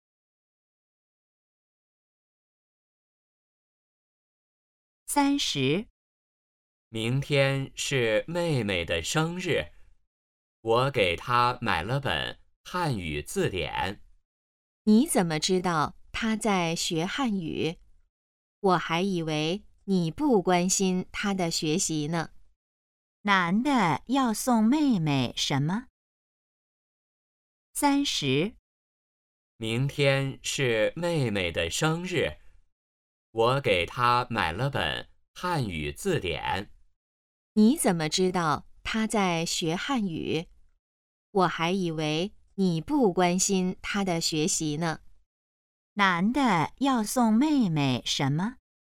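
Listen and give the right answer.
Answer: 汉语字典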